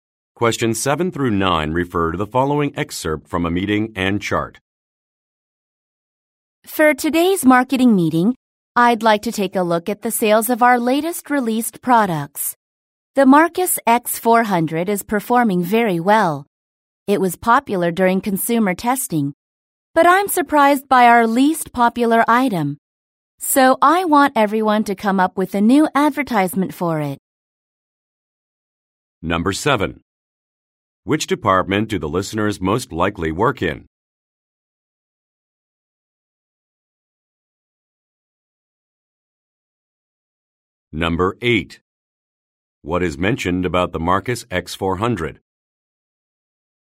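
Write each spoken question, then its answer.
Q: Which department do the listeners most likely work in?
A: Marketing.

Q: What is mentioned about the Marcus X400?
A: It is selling very well.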